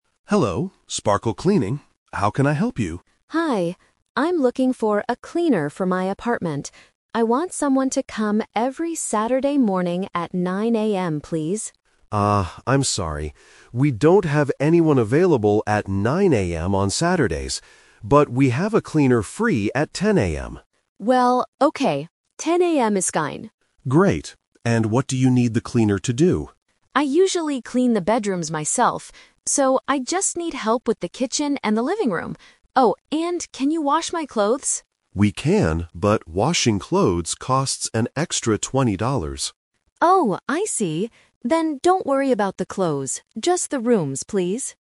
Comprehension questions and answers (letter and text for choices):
Listen to the conversation and choose the correct answer (A, B, or C).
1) What time will the cleaner arrive on Saturdays?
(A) 9:00 AM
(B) 10:00 AM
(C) 11:00 AM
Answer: (B) 10:00 AM

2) Which part of the apartment does Anna clean by herself?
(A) The bedrooms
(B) The kitchen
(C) The living room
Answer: (A) The bedrooms

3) Why did Anna decide NOT to have her clothes washed?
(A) She already washed them.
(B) It costs extra money.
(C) The cleaner doesn't have time.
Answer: (B) It costs extra money.

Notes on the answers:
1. The manager says, "But we have a cleaner free at 10:00 AM," and Anna agrees ("10:00 AM is fine"). Option A (9:00 AM) is a trap because Anna wanted 9:00 AM at first, but the cleaners were not available. Option C is not mentioned.
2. Anna says, "I usually clean the bedrooms myself." Options B and C are traps because the kitchen and the living room are the rooms the cleaner will clean.
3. The manager says washing clothes costs an "extra $20," so Anna says "don't worry about the clothes" (meaning she doesn't want the service). Option A and C are plausible reasons, but they are not mentioned in the audio.

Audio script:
Manager: Hello, Sparkle Cleaning. How can I help you?
Anna: Hi. I'm looking for a cleaner for my apartment. I want someone to come every Saturday morning at 9:00 AM, please.
Manager: Ah, I'm sorry. We don't have anyone available at 9:00 AM on Saturdays. But we have a cleaner free at 10:00 AM.
Anna: Well, okay. 10:00 AM is fine.
Manager: Great. And what do you need the cleaner to do?
Anna: I usually clean the bedrooms myself. So, I just need help with the kitchen and the living room. Oh, and can you wash my clothes?
Manager: We can, but washing clothes costs an extra $20.